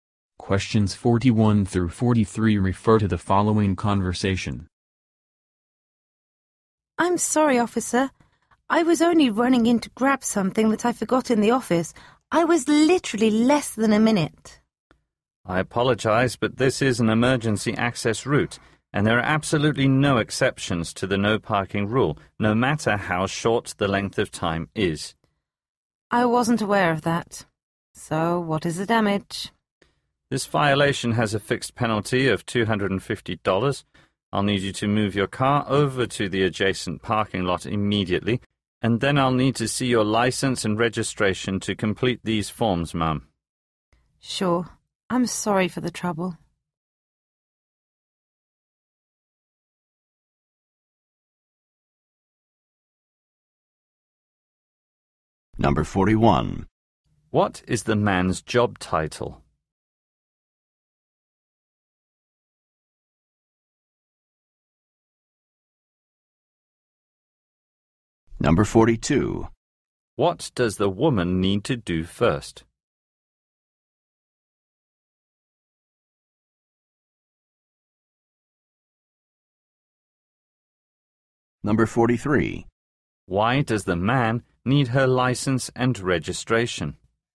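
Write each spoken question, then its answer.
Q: What is the man's job title?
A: Police officer

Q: What does the woman need to do first?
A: Move her car to the adjacent parking lot

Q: Why does the man need her license and registration?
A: To complete the forms for the fine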